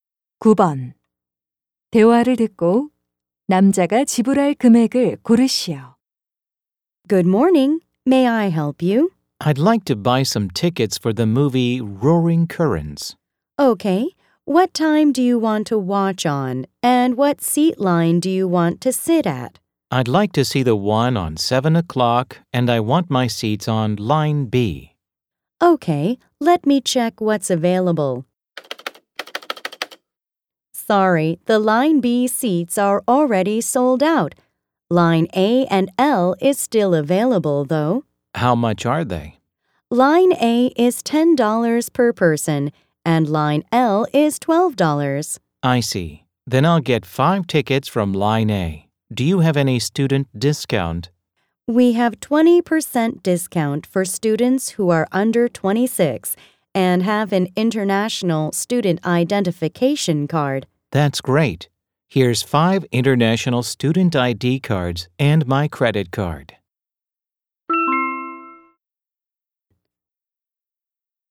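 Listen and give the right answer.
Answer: $40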